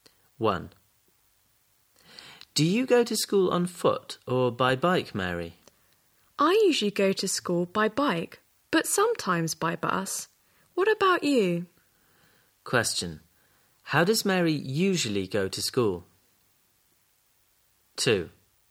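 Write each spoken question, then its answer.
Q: How does Mary usually go to school?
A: By bike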